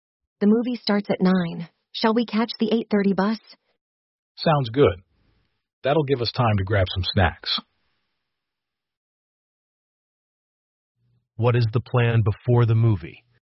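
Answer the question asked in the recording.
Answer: To take the 8:30 bus and get some snacks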